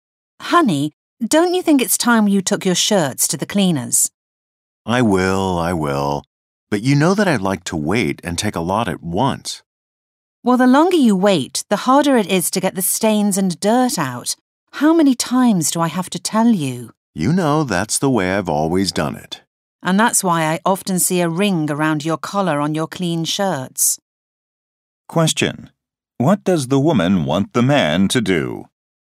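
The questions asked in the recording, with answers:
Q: What does the woman want the man to do?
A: Take his shirts to the cleaners now instead of waiting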